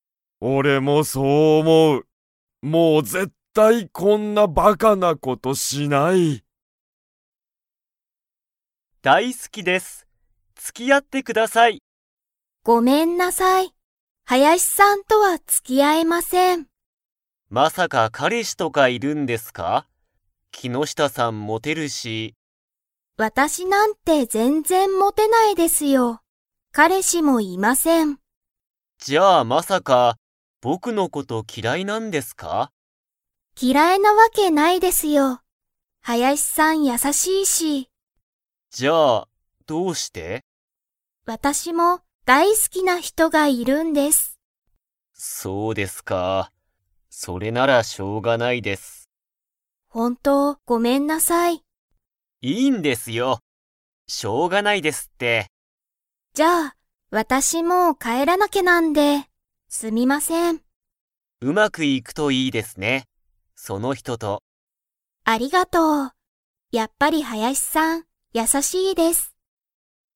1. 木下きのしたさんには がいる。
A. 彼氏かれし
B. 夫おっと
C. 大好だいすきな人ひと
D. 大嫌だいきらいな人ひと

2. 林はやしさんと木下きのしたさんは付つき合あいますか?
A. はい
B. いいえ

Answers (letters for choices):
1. C
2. B

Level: Level 4